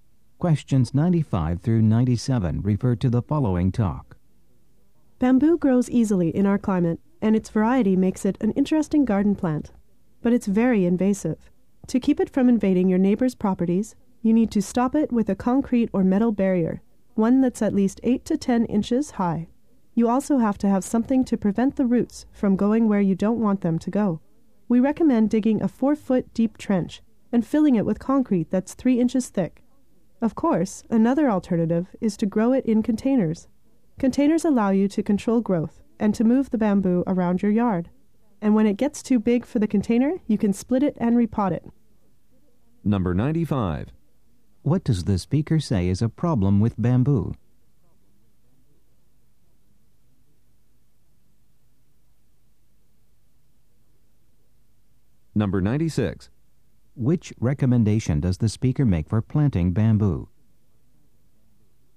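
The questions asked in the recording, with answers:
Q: What does the speaker say is a problem with bamboo?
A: It is very invasive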